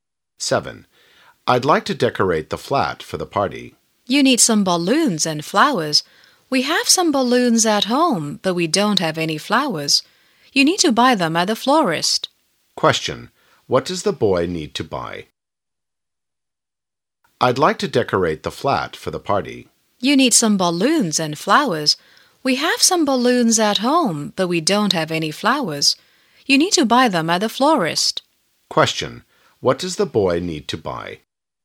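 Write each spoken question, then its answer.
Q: Question: What does the boy need to buy?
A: Flowers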